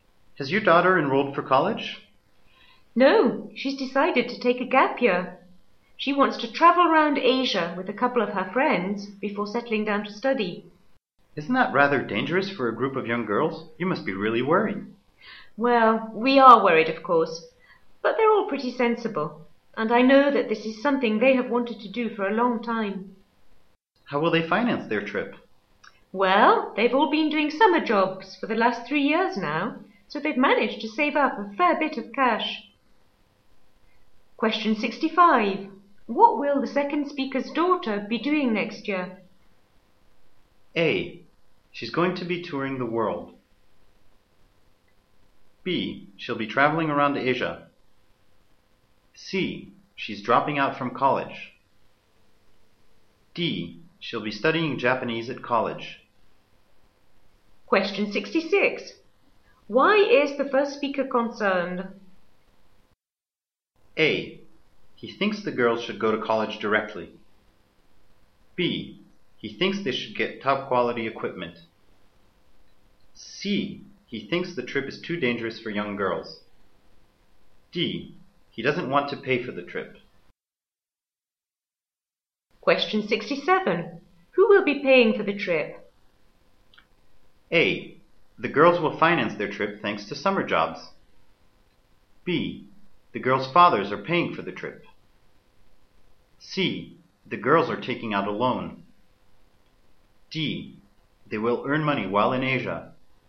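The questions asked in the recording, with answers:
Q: What will the second speaker's daughter be doing next year?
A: B: She'll be traveling around Asia.

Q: Why is the first speaker concerned?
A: C: He thinks the trip is too dangerous for young girls.

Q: Who will be paying for the trip?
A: A: The girls will finance their trip thanks to summer jobs.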